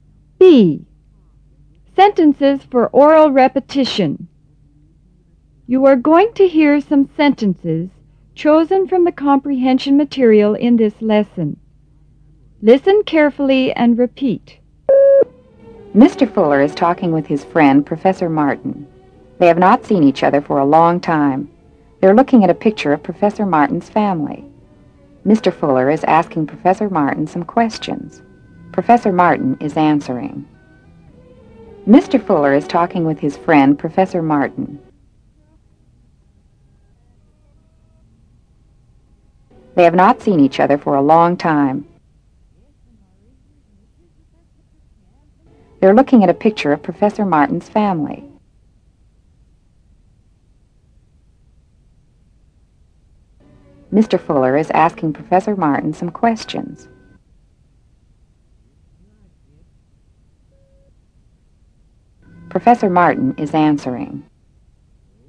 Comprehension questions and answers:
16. Mr. Fuller is talking with ___16___ Professor Martin.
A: his friend

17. They have not seen each other for ___17___.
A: a long time.

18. They are looking at ___18___ of Professor Martin's family.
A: a picture